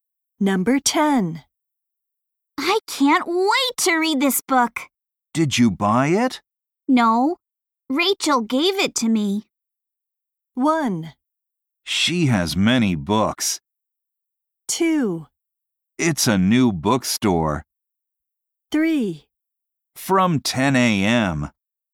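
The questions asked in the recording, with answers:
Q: No. Rachel gave it to me.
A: 1: She has many books.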